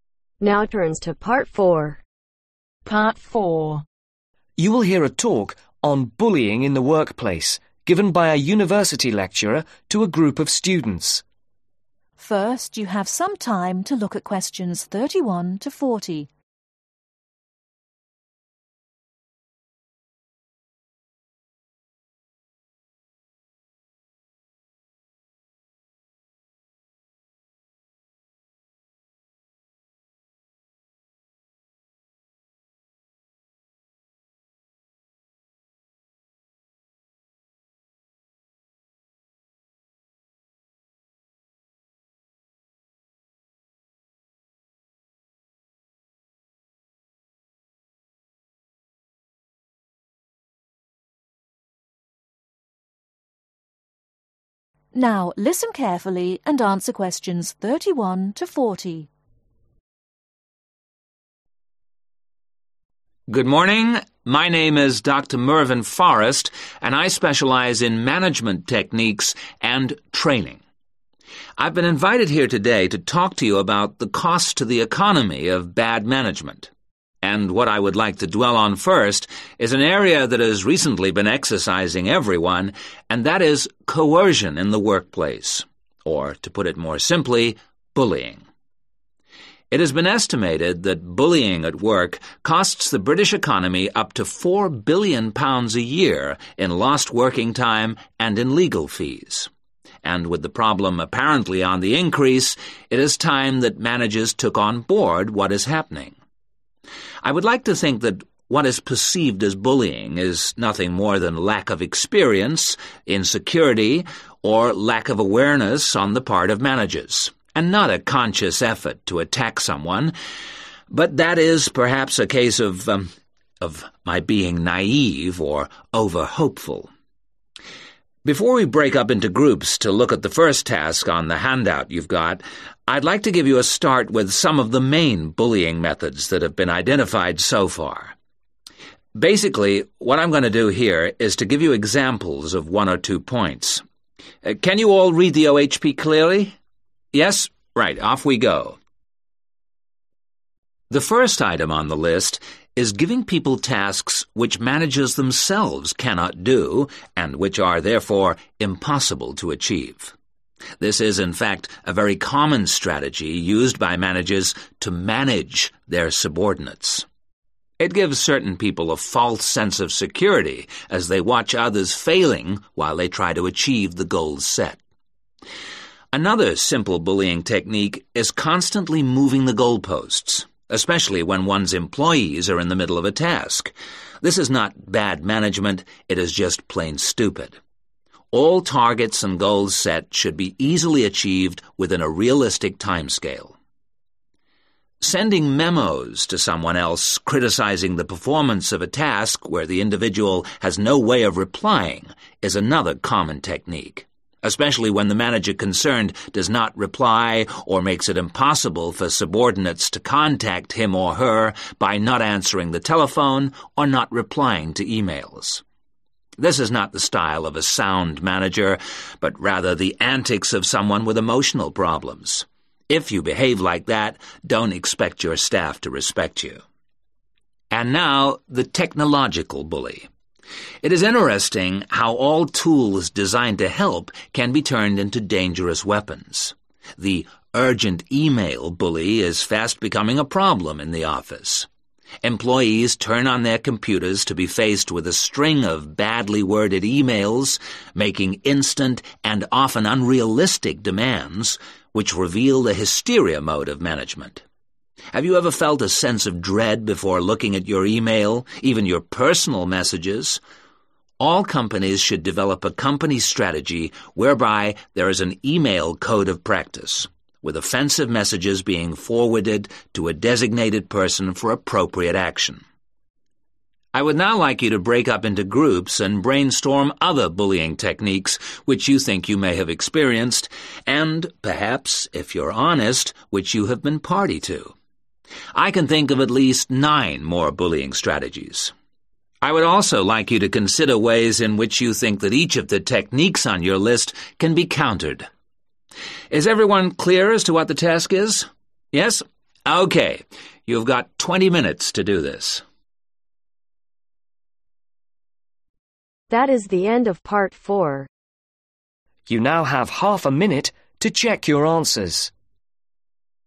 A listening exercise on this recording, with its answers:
Complete the information below. Write ONE WORD ONLY for each answer.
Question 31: Notes: The speaker specializes in management techniques and (31) ............ .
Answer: training

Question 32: Bullying in the workplace costs the British (32) ............ up t0 £4 billion a year.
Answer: economy

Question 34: setting (34) ............ tasks.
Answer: impossible

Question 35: stopping individuals (35) ............ to criticism.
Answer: replying/responding

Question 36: Not answering the (36) ............ or replying to e-mails.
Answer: telephone

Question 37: this means you cannot expect your staff to (37) ............ you.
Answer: respect

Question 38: Using technology, Companies should develop an (38) ............ code of practice.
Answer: e-mail/email

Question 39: In groups (39) ............ other bullying strategies and ways in which they can be (40) ............ .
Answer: brainstorm

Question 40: In groups (39) ............ other bullying strategies and ways in which they can be (40) ............ .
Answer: countered